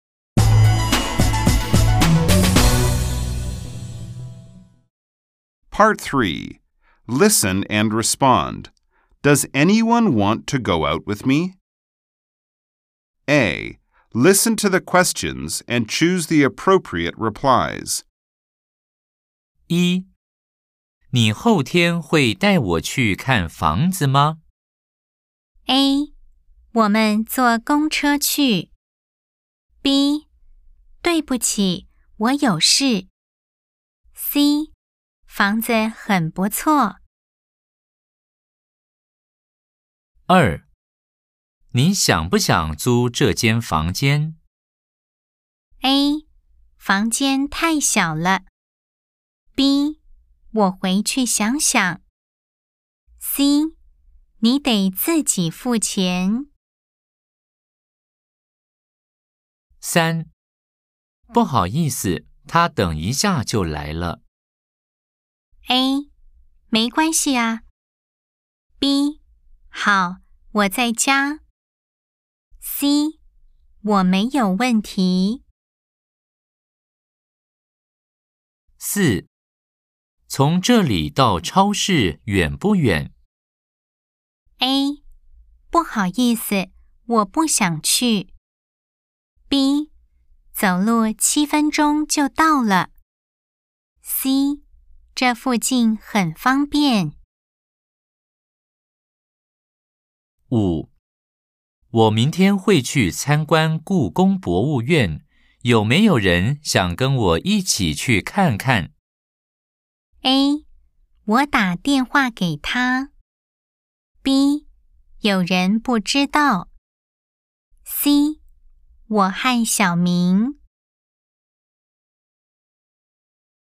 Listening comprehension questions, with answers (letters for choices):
A. Nghe câu hỏi và chọn câu trả lời thích hợp.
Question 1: 你後天會帶我去看房子嗎?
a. 我們坐公車去。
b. 對不起,我有事。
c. 房子很不錯。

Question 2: 你想不想住這間房間?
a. 房間太小了。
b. 我回去想想。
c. 你得自己付錢。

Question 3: 不好意思,他等一下就來了。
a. 沒關係啊!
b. 好,我在家。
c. 我沒問題。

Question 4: 從這裡到超市遠不遠?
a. 不好意思,我不想去。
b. 走路七分鐘就到了。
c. 這附近很方便。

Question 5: 我明天會去參觀故宮博物院,有沒有人想跟我一起去看看?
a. 我打電話給他。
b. 有人不知道。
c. 我和小明。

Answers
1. b
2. b
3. a
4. b
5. c